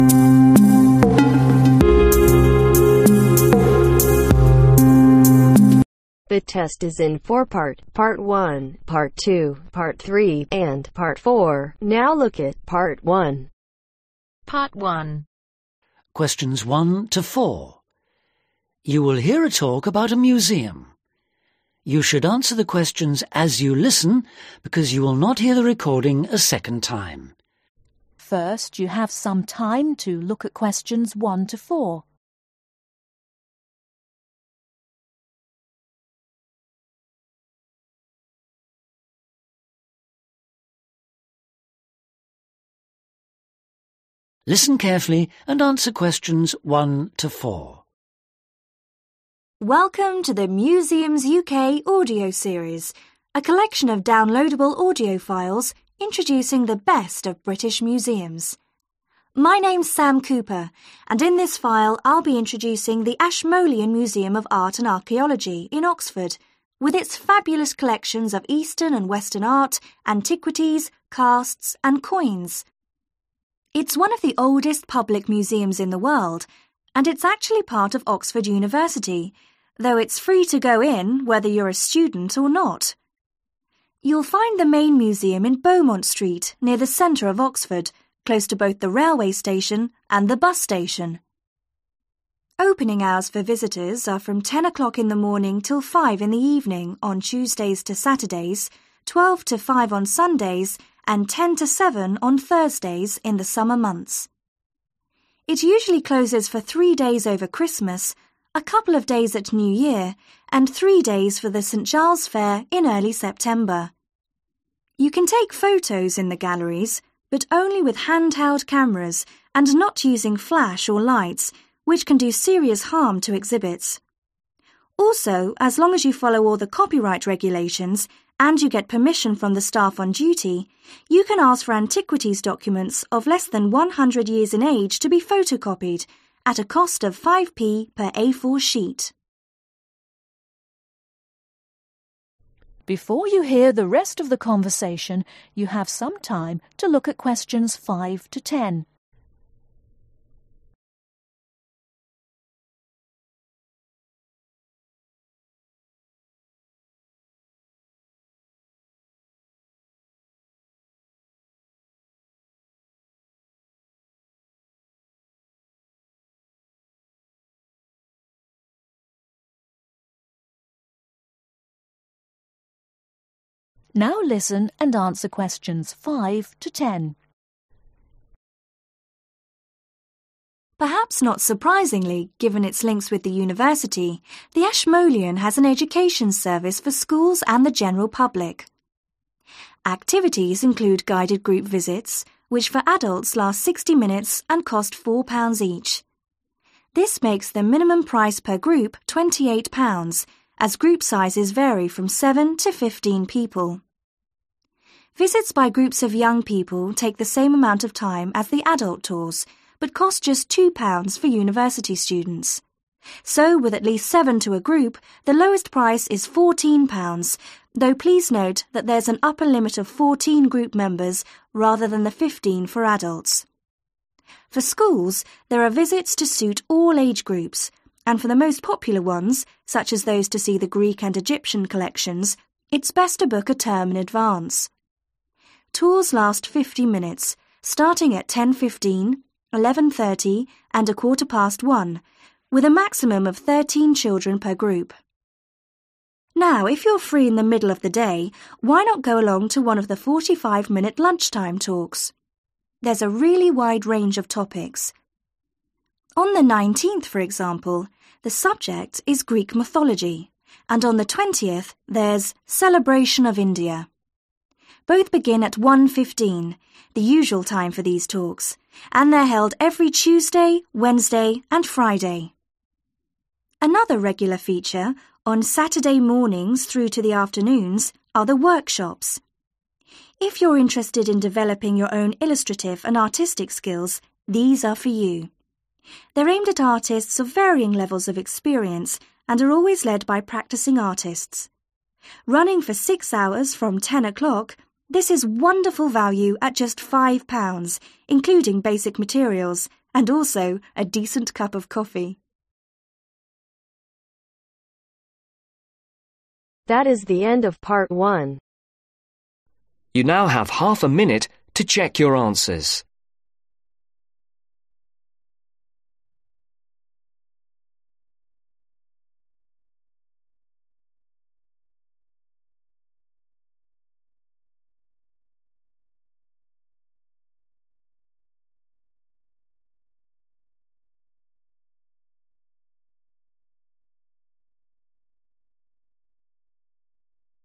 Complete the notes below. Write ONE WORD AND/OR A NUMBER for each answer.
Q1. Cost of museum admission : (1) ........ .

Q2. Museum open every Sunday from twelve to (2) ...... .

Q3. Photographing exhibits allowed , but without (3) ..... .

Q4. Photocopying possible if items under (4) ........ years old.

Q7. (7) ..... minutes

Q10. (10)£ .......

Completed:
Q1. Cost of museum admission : Free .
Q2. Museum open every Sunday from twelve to 5/Five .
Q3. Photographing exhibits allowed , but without Flash or Lights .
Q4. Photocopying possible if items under 100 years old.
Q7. 50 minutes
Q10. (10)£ 5